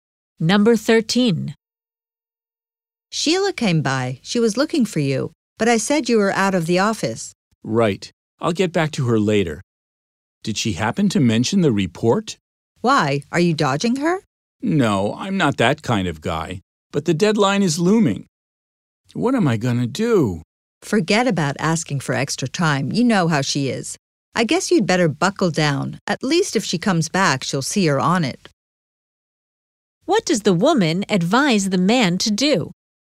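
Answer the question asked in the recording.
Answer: Buckle down and work on the report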